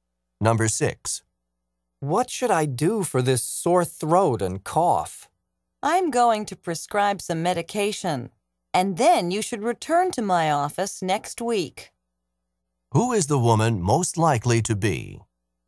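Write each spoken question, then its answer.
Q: Who is the woman most likely to be?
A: A doctor.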